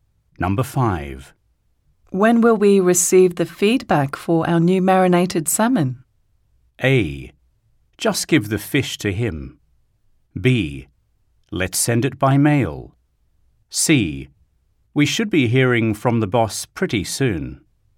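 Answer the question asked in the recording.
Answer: C: We should be hearing from the boss pretty soon.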